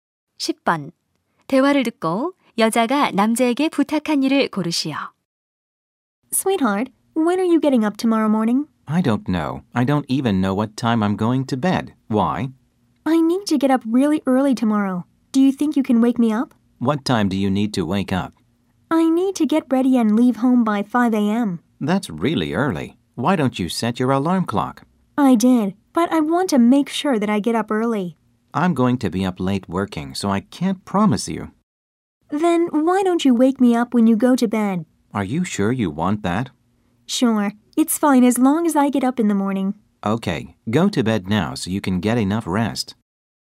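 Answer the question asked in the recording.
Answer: 잠자리에 들 때 자신을 깨워 달라는 것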